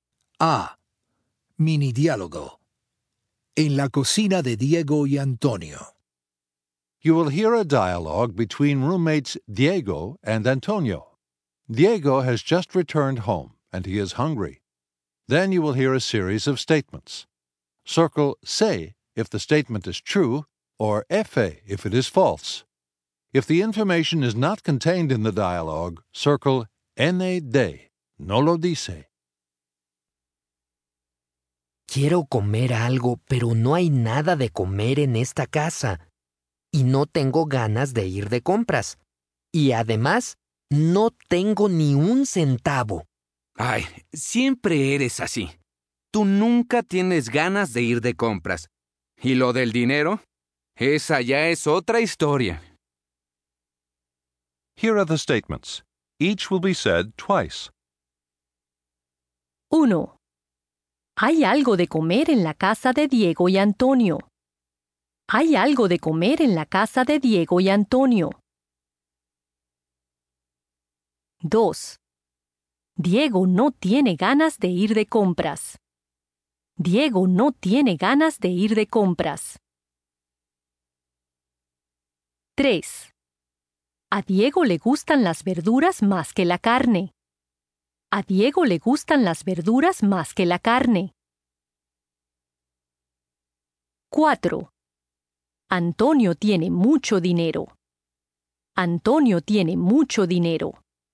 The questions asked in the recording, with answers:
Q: A Diego le gustan las verduras más que la carne.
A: ND

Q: Antonio tiene mucho dinero.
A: ND